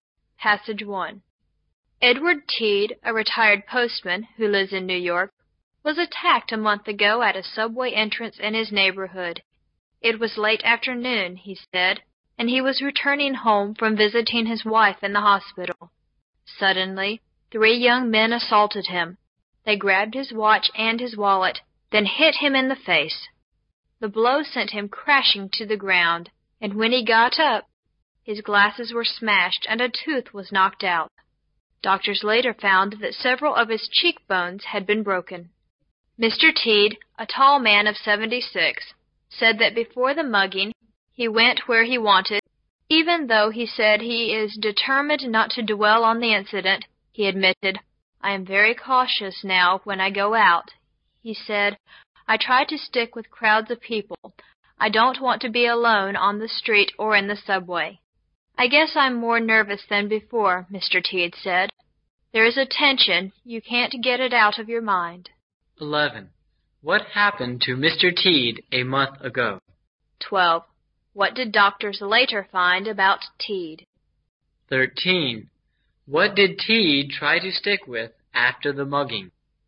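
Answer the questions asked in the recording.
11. He was attacked at a subway entrance
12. Several of his cheekbones had been broken
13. Crowds of people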